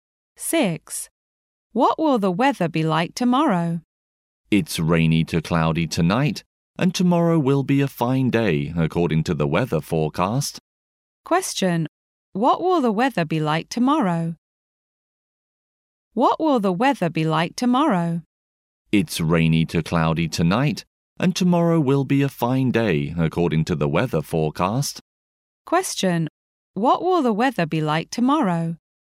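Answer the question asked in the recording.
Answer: It will be fine.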